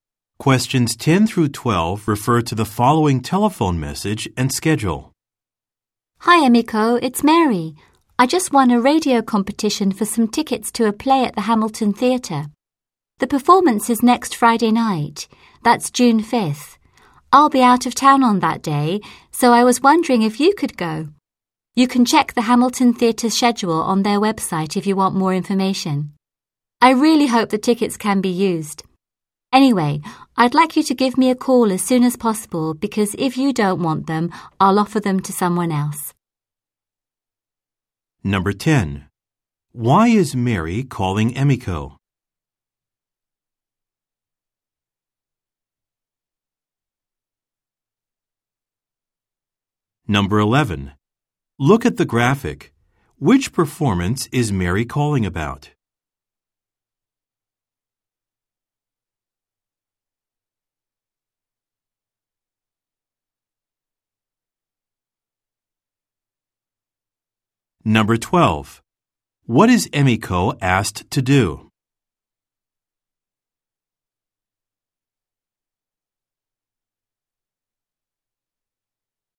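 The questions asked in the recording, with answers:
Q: Why is Mary calling Emiko?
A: To offer her tickets to a play at the Hamilton Theatre

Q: What is Emiko asked to do?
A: Call Mary back as soon as possible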